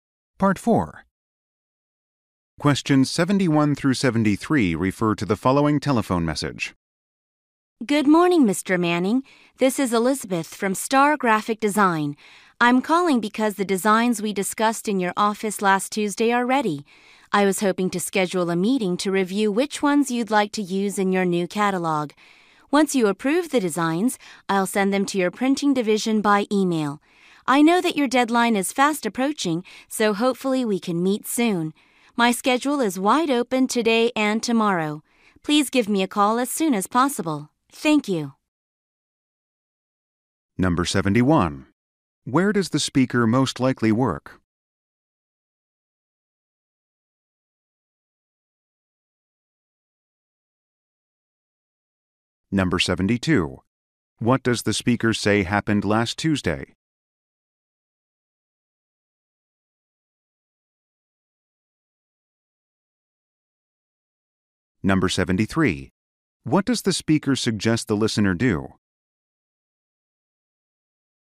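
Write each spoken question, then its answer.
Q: Where does the speaker most likely work?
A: At a graphic design company (Star Graphic Design)

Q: What does the speaker say happened last Tuesday?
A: They discussed the designs in the listener's office

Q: What does the speaker suggest the listener do?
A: Call her back as soon as possible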